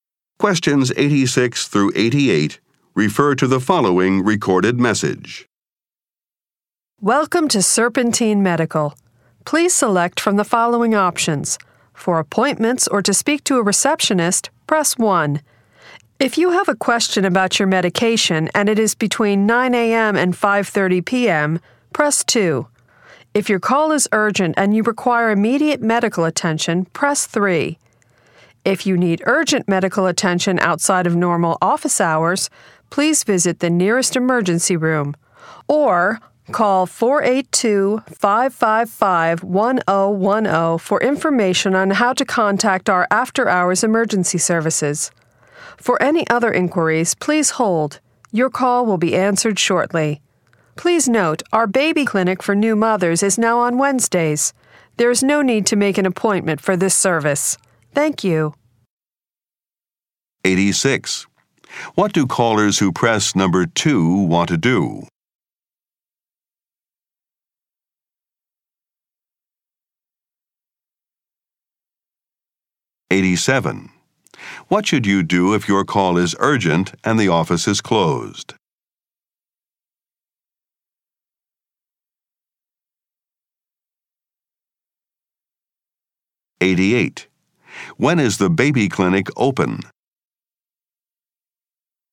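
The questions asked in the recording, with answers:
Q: What do callers who press number 2 want to do?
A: Ask about their medication

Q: What should you do if your call is urgent and the office is closed?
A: Go to the nearest emergency room or call 482-555-1010

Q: When is the baby clinic open?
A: On Wednesdays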